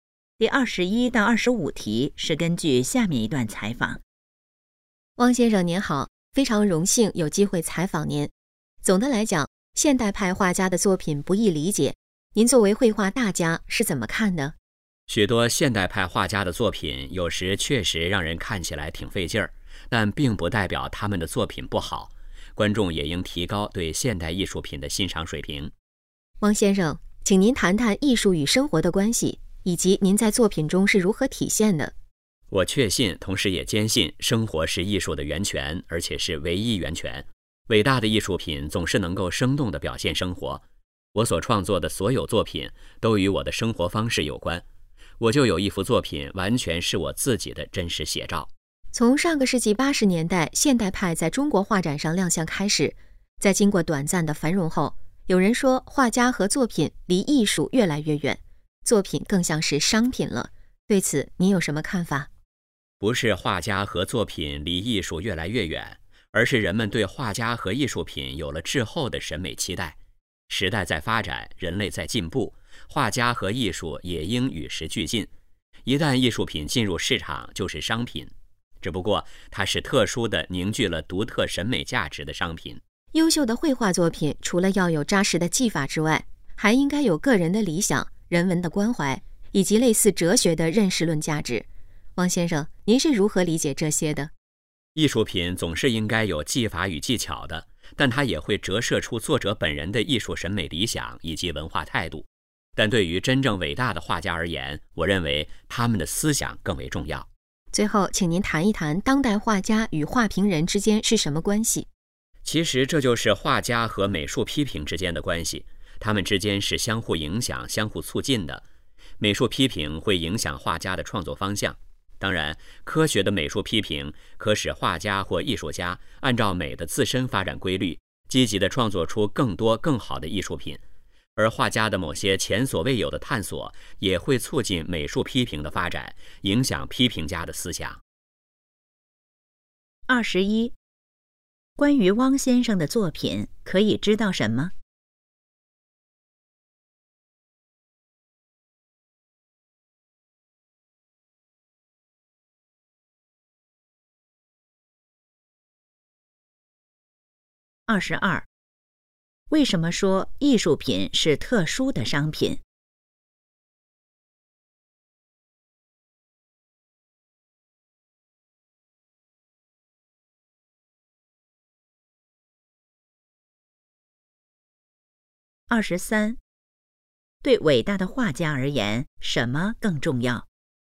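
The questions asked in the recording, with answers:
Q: 关于汪先生的作品可以知道什么?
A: 有一幅作品是他自己的真实写照

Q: 为什么说艺术品是特殊的商品?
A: 凝聚了独特的审美价值

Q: 对伟大的画家而言,什么更重要?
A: 思想

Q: 汪先生认为美术批评会从哪方面影响画家的创作?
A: 创作方向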